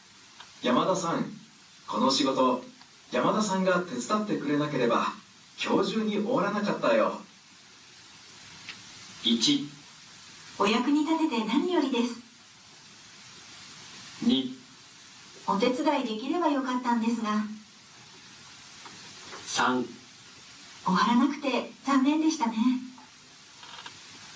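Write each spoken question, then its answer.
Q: 山田さん、この仕事、山田さんが手伝ってくれなければ今日中に終わらなかったよ。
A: 1: お役に立てて何よりです。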